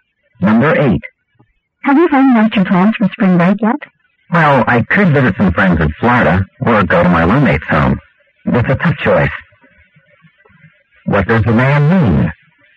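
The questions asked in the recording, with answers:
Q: What does the man mean?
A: He hasn't decided yet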